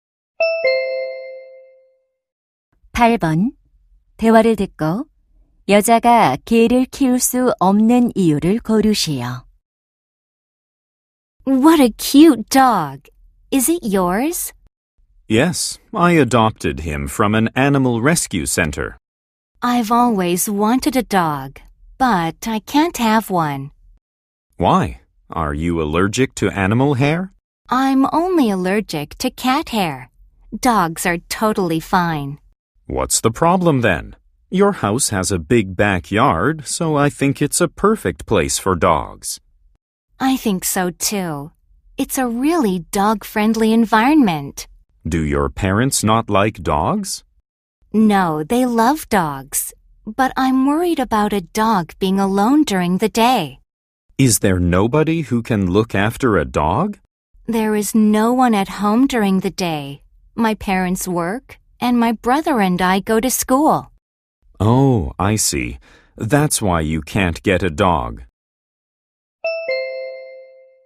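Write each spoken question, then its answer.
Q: 대화를 듣고 여자가 개를 키울 수 없는 이유를 고르시오.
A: 낮에 집에 개를 돌볼 사람이 없어서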